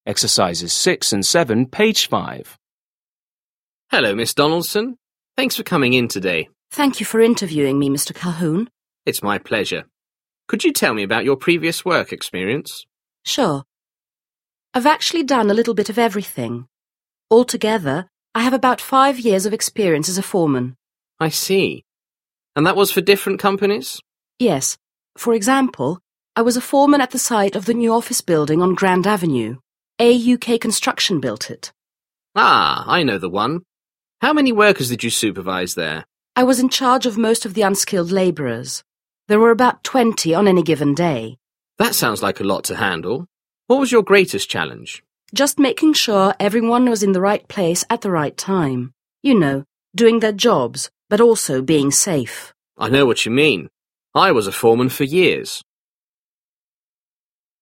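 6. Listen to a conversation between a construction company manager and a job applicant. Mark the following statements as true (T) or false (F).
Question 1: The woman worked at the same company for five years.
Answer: F

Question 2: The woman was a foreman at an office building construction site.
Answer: T

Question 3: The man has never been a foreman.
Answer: F

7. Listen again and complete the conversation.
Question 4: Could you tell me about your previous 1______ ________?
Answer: work experience

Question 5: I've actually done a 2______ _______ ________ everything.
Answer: little bit of

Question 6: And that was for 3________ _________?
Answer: different companies

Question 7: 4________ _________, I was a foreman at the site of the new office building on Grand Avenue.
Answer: For example

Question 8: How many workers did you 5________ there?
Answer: supervise

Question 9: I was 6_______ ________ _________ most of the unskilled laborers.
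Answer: in charge of

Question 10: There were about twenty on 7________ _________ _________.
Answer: any given day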